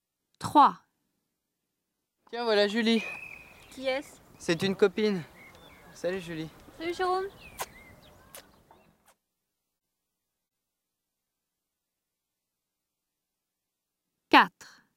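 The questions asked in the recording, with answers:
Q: Qui est-ce?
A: une copine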